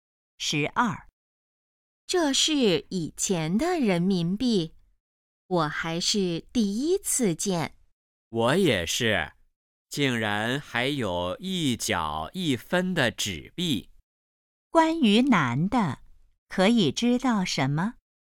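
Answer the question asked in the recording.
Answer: 第一次见以前的人民币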